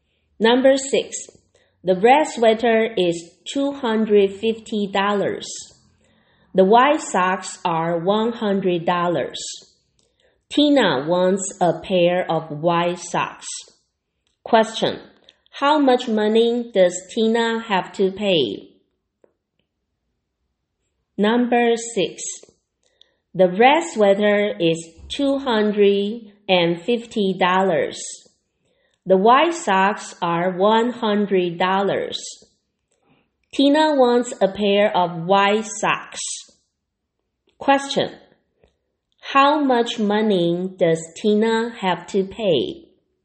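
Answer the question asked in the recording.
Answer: $100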